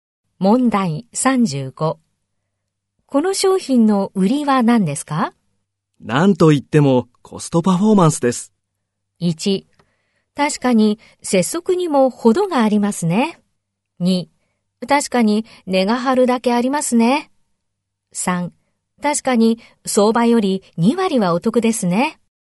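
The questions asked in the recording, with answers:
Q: この商品の売りは何ですか。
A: 3: 確かに相場より2割はお得ですね。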